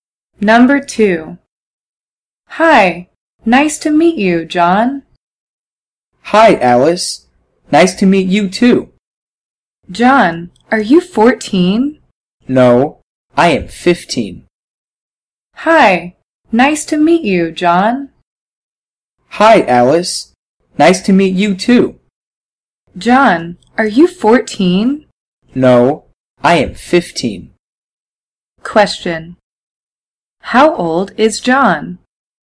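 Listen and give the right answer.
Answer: 15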